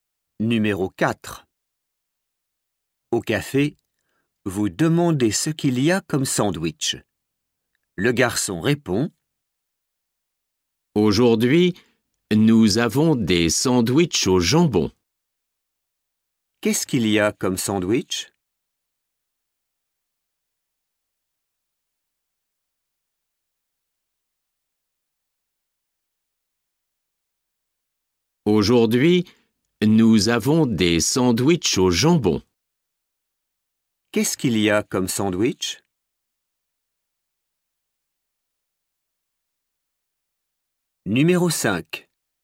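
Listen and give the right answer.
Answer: des sandwichs au jambon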